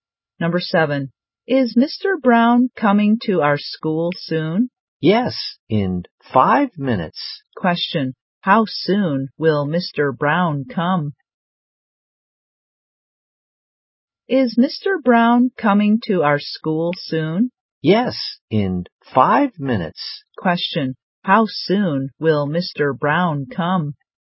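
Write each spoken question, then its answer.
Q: How soon will Mr. Brown come?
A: In 5 minutes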